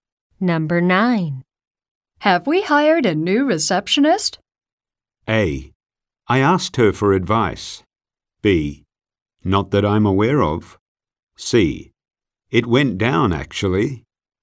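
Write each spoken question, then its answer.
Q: Have we hired a new receptionist?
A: B: Not that I'm aware of.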